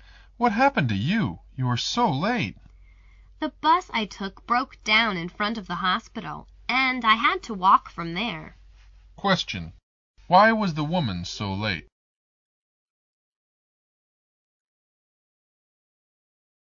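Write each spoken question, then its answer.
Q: Why was the woman so late?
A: Her bus broke down and she had to walk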